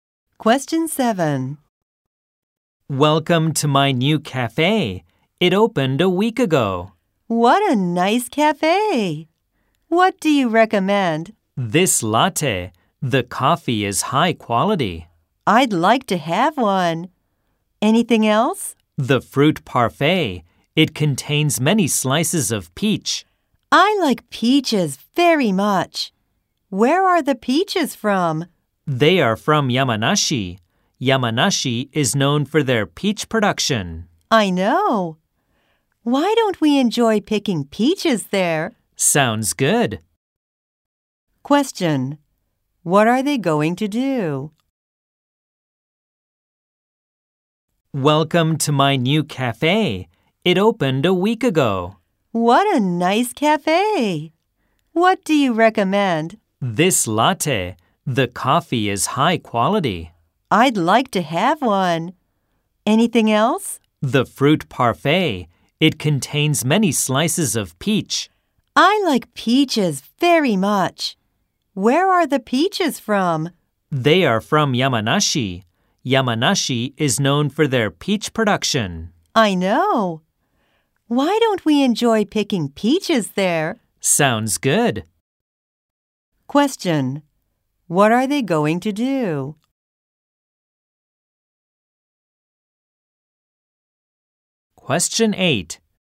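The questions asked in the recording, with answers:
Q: What are they going to do?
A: Go peach picking in Yamanashi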